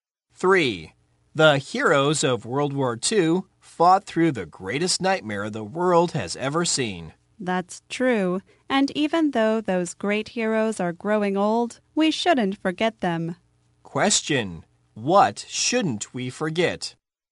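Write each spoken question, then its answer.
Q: what shouldn't we forget?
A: The heroes of World War II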